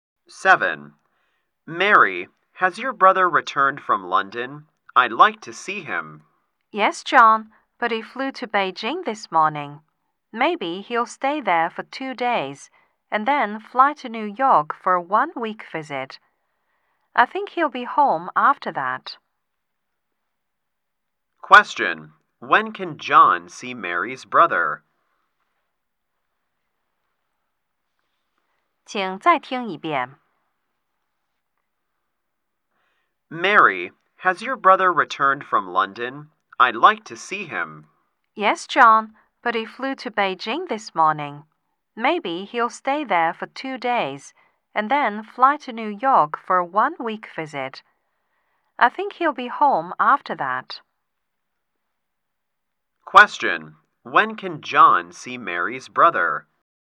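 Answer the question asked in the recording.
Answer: In about nine days, after he returns from New York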